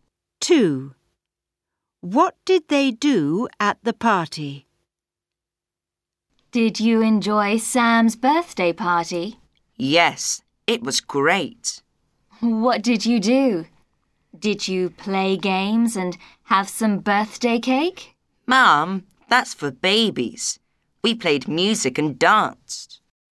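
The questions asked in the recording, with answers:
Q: What did they do at the party?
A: played music and danced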